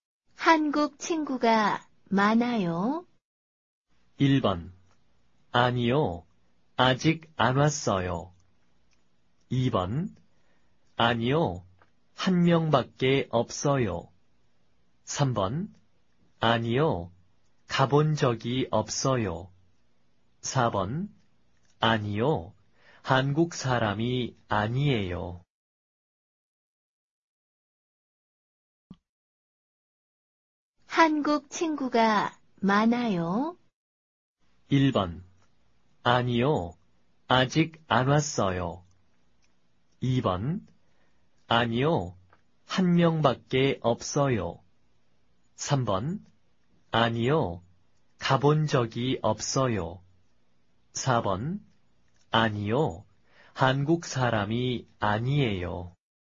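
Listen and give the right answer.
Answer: 2: 아니요, 한 명밖에 없어요.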